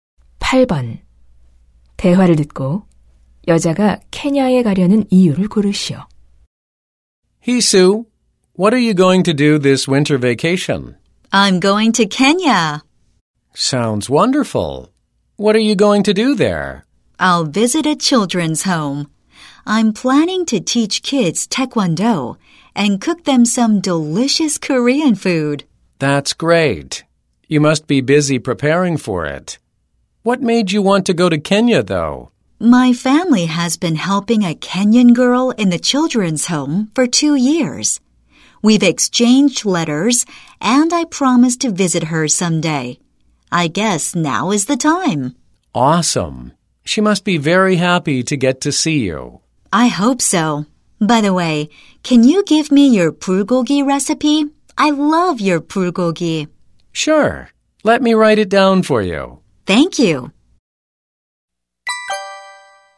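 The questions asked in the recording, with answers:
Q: 대화를 듣고 여자가 케냐에 가려는 이유를 고르시오.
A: 가족이 후원해 온 케냐 소녀를 만나기로 약속해서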